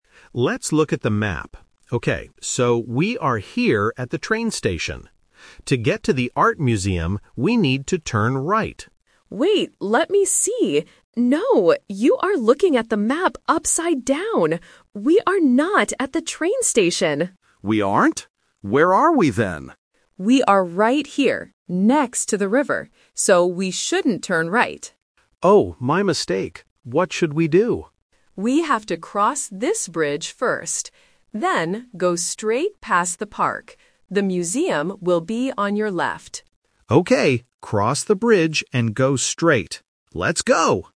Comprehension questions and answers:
Listen to the conversation between two tourists looking at a map. Choose the correct answer (A, B, or C) for each question.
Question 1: Where are the tourists right now?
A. At the train station.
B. Next to the river.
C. Inside the art museum.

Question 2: What is the first thing the tourists need to do?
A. Turn right.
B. Cross the bridge.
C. Go straight past the park.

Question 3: Where is the art museum located?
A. On the left.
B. On the right.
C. Next to the train station.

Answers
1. B. Next to the river.
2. B. Cross the bridge.
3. A. On the left.

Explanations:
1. The Key: Tourist B corrects her friend and states their real location: "We are right here, next to the river." The Trap: Option (A) is a classic trap. Tourist A thought they were at the train station because he read the map wrong, but Tourist B says, "We are not at the train station." Option (C) is their final destination, not their current location.
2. The Key: Tourist B gives the correct first step: "We have to cross this bridge first." The Trap: Option (A) is the exact trap ("The Twist"). Tourist A originally wanted to turn right, but Tourist B says, "we shouldn't turn right." Option (C) is a correct instruction, but it is the second step, not the first thing they need to do.
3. The Key: Tourist B clearly says, "The museum will be on your left." The Trap: Option (B) uses the word "right", which was mentioned earlier as the wrong direction to turn. Option (C) uses a location mentioned at the beginning of the audio to confuse the listener.

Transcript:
Tourist A: Let's look at the map. Okay, so we are here at the train station. To get to the art museum, we need to turn right.
Tourist B: Wait, let me see... No, you are looking at the map upside down! We are not at the train station.
Tourist A: We aren't? Where are we then?
Tourist B: We are right here, next to the river. So, we shouldn't turn right.
Tourist A: Oh, my mistake. What should we do?
Tourist B: We have to cross this bridge first. Then, go straight past the park. The museum will be on your left.

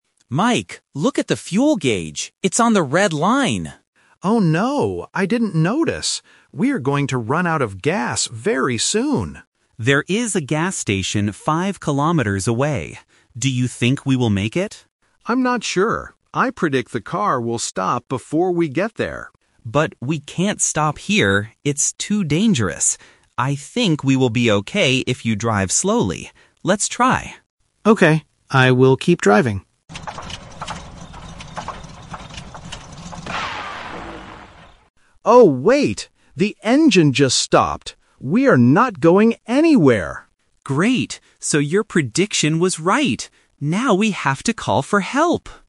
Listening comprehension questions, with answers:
Listen to the conversation between two friends in a car. Choose the correct answer (A, B, or C).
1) What is the problem with the car?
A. It is driving too slowly.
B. It is running out of gas.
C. The engine is too hot.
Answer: B. It is running out of gas.

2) What does Tom predict will happen if Mike drives slowly?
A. They will reach the gas station safely.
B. The car will stop immediately.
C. They will find a safe place to park.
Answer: A. They will reach the gas station safely.

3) What actually happens at the end of the conversation?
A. They walk five kilometers to the station.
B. They safely arrive at the gas station.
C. The car's engine stops on the road.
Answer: C. The car's engine stops on the road.

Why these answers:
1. Mike explicitly says, "We are going to run out of gas very soon." Trap: Option (A) is a "Solution Trap". Tom suggests driving slowly to save gas, but it is not the main problem. Option (C) is a common car problem in real life, but it is never mentioned in the audio.
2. Tom is optimistic and says, "I think we will be okay if you drive slowly. Let's try!" (meaning they will make it to the station). Trap: Option (B) is a "Person Trap". This is Mike's prediction, not Tom's. Option (C) is a trap because Tom says "we can't stop here", but he doesn't predict finding a parking space.
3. At the end, the car makes a noise and Mike says, "The engine just stopped! We are not going anywhere." Trap: Option (B) is the classic A2 "Twist" trap. They planned and tried to reach the station, but failed. Option (A) uses the "five kilometers" mentioned earlier, but they decide to "call for help", not walk.

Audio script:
Tom: Mike, look at the fuel gauge! It's on the red line.
Mike: Oh no! I didn't notice. We are going to run out of gas very soon.
Tom: There is a gas station five kilometers away. Do you think we will make it?
Mike: I'm not sure. I predict the car will stop before we get there.
Tom: But we can't stop here. It's too dangerous. I think we will be okay if you drive slowly. Let's try!
Mike: Okay, I will keep driving.
Mike: Oh, wait... The engine just stopped! We are not going anywhere.

